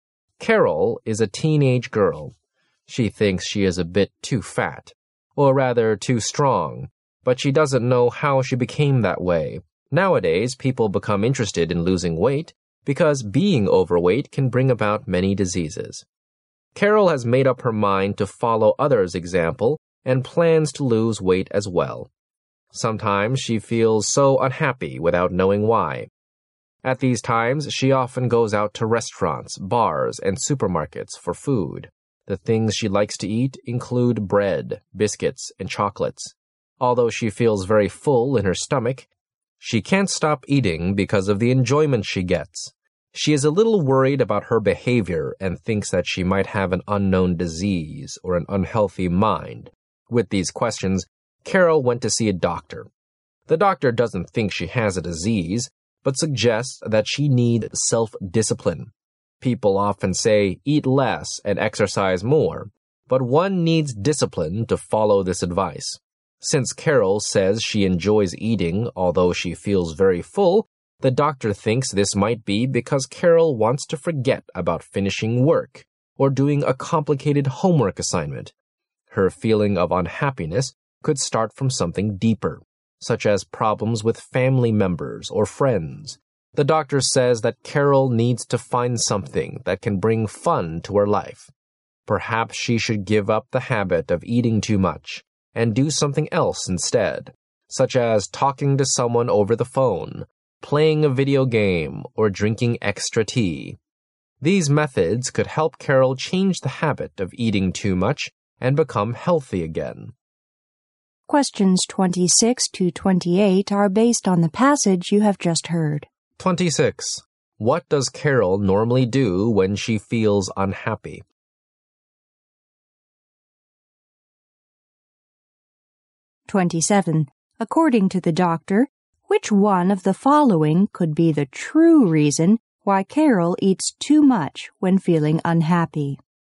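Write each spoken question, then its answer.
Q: What does Carol normally do when she feels unhappy?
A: Goes out to eat food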